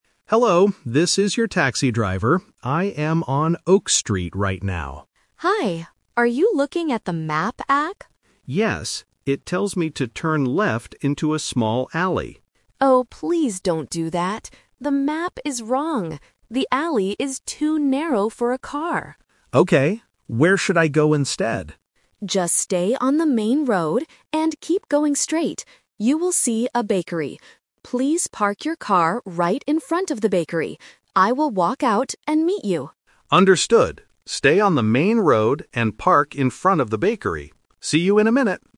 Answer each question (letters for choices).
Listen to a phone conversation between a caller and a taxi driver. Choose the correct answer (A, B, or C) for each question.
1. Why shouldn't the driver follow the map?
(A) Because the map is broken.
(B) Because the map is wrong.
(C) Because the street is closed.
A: B

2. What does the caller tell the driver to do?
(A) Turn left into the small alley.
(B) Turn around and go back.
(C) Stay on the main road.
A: C

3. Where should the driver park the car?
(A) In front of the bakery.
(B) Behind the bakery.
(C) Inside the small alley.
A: A

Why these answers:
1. The Key: The caller clearly states: "The map is wrong." The Trap: Option (A) is a distractor; the app is working, but the information is incorrect. Option (C) is a common reason used in other listening tests, but it is not mentioned here.
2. The Key: The caller gives the explicit instruction: "Just stay on the main road and keep going straight." The Trap: Option (A) is the classic "Twist" trap. Turning left is what the map suggests, but the caller specifically says, "please don't do that."
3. The Key: The caller says, "Please park your car right in front of the bakery." The Trap: Option (B) uses the correct landmark (bakery) but the wrong preposition (behind instead of in front of). Option (C) refers to the area the car must avoid.

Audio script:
Driver: Hello, this is your taxi driver. I am on Oak Street right now.
Caller: Hi! Are you looking at the map app?
Driver: Yes, it tells me to turn left into a small alley.
Caller: Oh, please don't do that. The map is wrong. The alley is too narrow for a car.
Driver: Okay. Where should I go instead?
Caller: Just stay on the main road and keep going straight. You will see a bakery. Please park your car right in front of the bakery.
Stay on the main road and park in front of the bakery. See you in a minute.